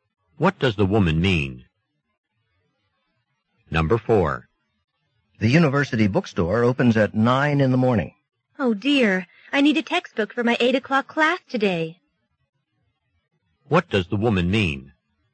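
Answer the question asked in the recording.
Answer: She can't buy the textbook in time for her class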